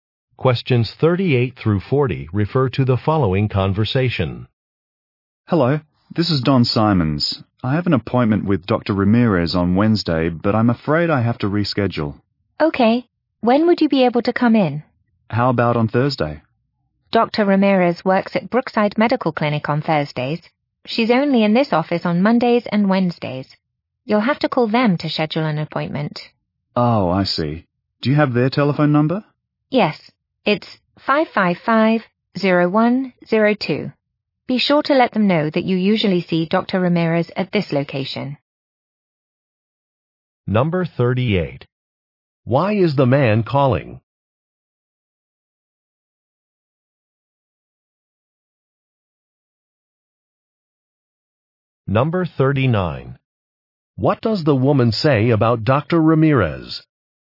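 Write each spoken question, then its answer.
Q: Why is the man calling?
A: To reschedule an appointment

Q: What does the woman say about Dr.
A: She works at Brookside Medical Clinic on Thursdays

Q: What does the woman give to the man?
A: A telephone number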